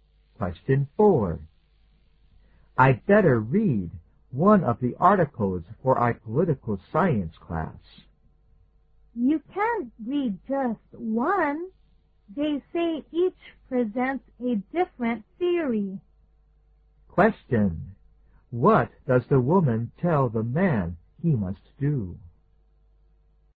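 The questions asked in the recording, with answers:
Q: What does the woman tell the man he must do?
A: Read all of the articles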